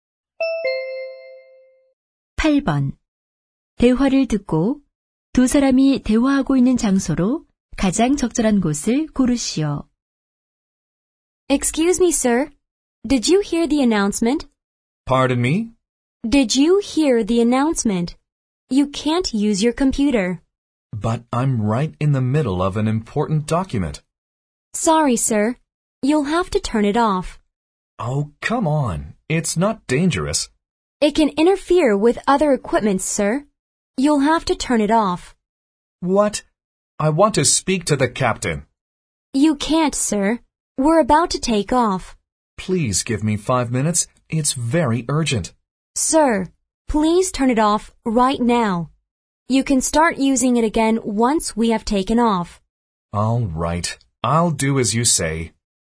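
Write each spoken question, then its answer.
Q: 대화를 듣고 두 사람이 대화하고 있는 장소로 가장 적절한 곳을 고르시오.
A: 비행기 안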